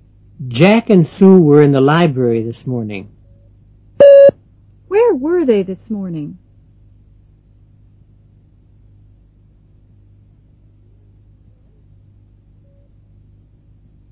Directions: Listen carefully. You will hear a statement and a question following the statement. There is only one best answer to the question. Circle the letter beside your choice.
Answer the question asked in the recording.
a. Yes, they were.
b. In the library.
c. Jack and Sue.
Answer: b. In the library.

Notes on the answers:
Jack and Sue were in the library this morning.

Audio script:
6.Jack and Sue were in the library this morning. Where were they this morning?